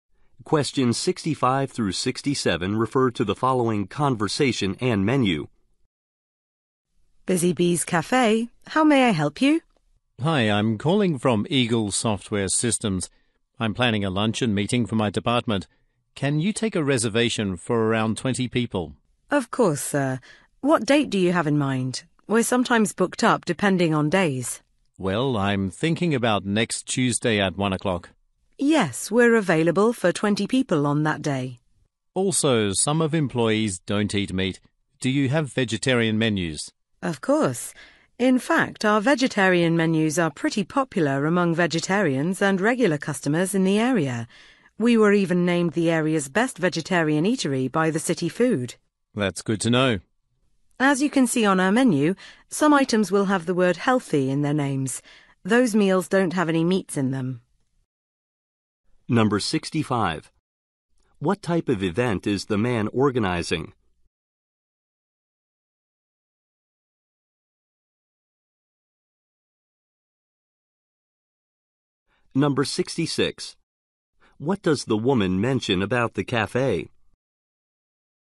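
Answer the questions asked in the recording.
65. A department luncheon meeting
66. It was named the area's best vegetarian eatery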